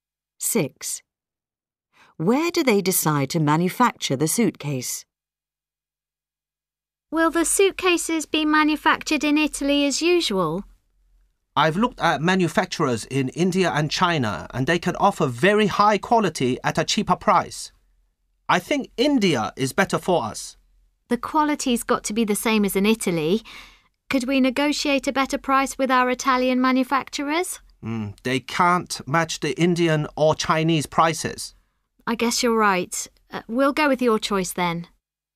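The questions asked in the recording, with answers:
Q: Where do they decide to manufacture the suitcase?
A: India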